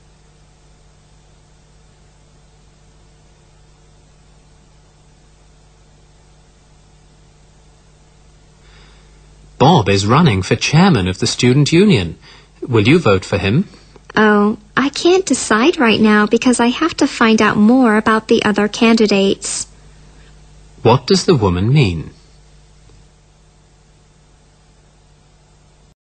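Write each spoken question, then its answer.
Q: What does the woman mean?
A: She hasn't decided yet; she needs to learn more about the other candidates first.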